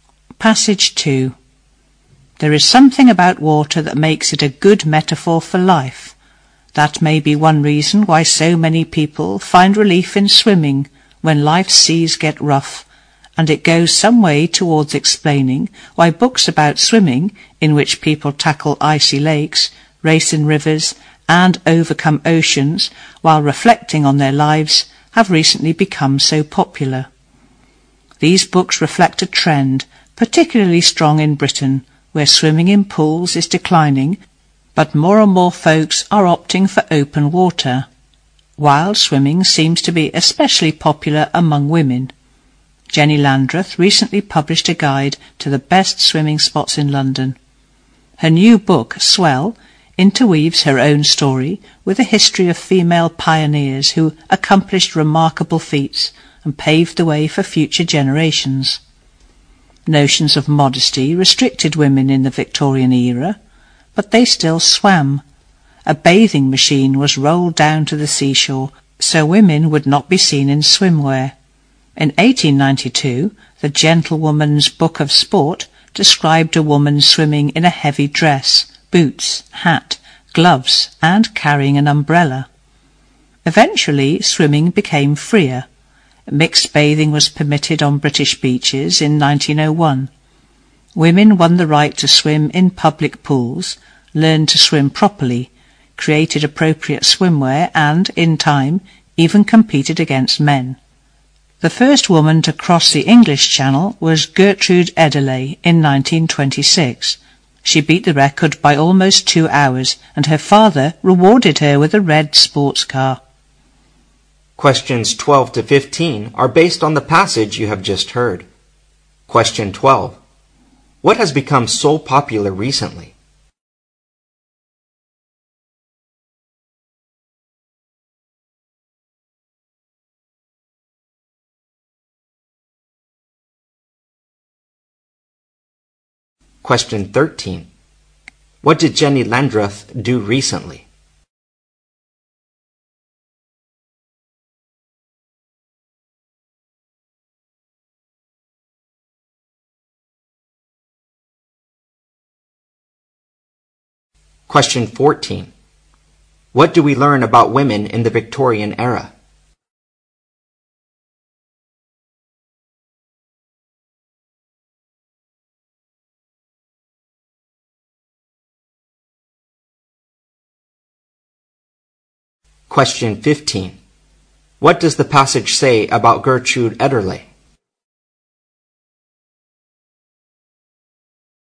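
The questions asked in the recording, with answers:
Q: What has become so popular recently?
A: Books about swimming

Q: What did Jenny Landreth do recently?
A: She published a guide to the best swimming spots in London.

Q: What do we learn about women in the Victorian era?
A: Notions of modesty restricted them, but they still swam.

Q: What does the passage say about Gertrude Edderley?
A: She was the first woman to swim across the English Channel.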